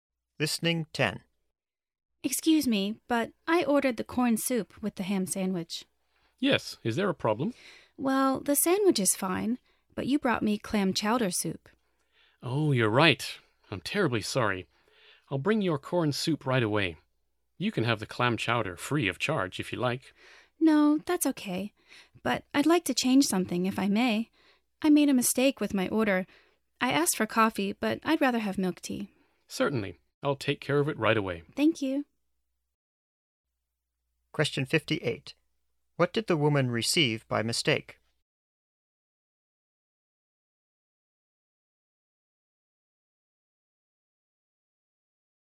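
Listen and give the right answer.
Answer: Clam chowder soup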